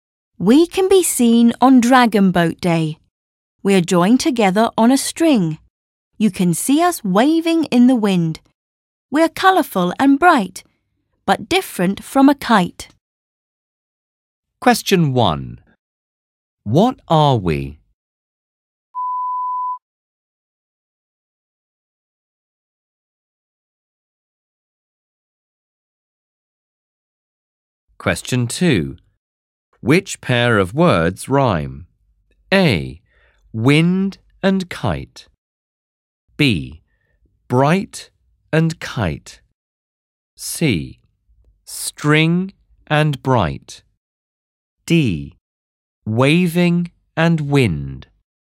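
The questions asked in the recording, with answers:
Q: Which pair of words rhyme?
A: B: Bright and kite.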